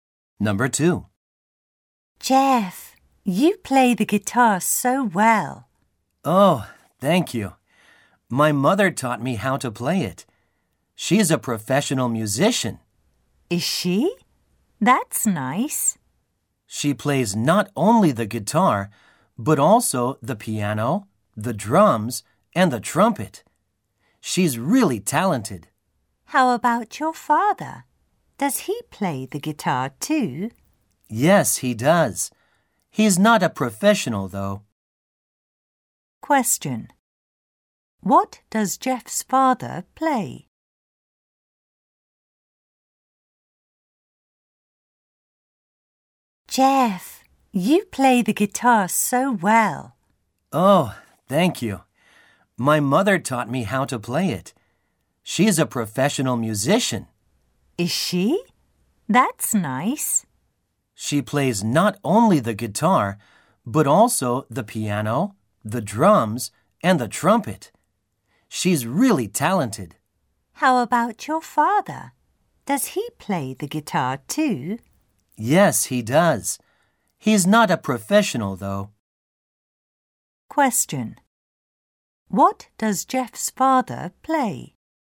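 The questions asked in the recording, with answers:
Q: What does Jeff's father play?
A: The guitar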